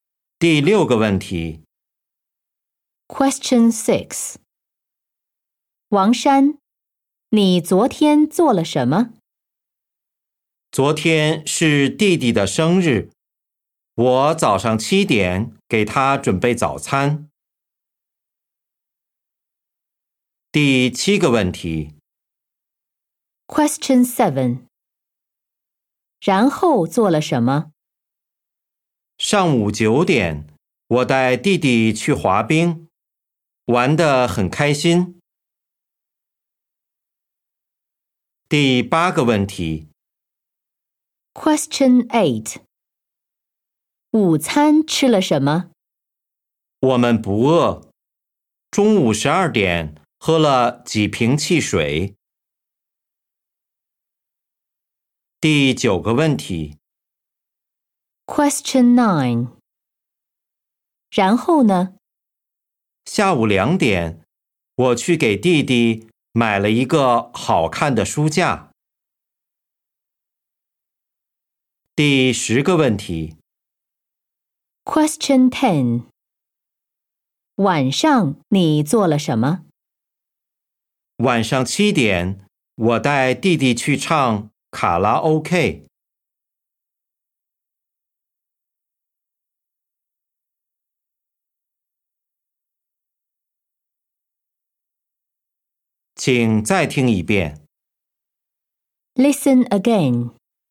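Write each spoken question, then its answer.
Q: 王珊,你昨天做了什么?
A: 给弟弟准备早餐

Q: 然后做了什么?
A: 带弟弟去滑冰

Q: 午餐吃了什么?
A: 喝了几瓶汽水

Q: 晚上你做了什么?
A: 带弟弟去唱卡拉OK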